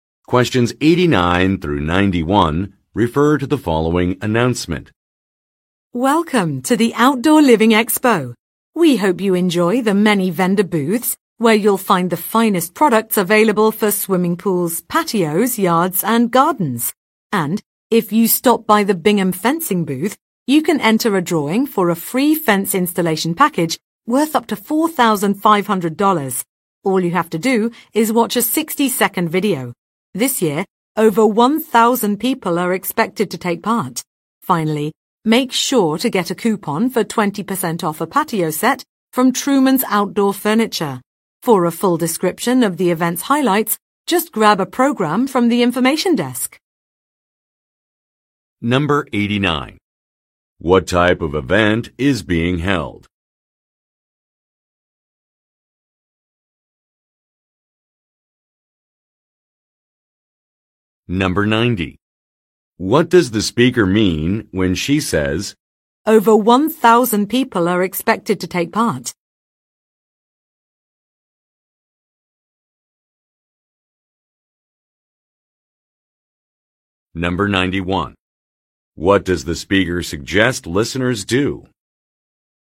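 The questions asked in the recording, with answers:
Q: What type of event is being held?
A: An outdoor living expo (home and garden products)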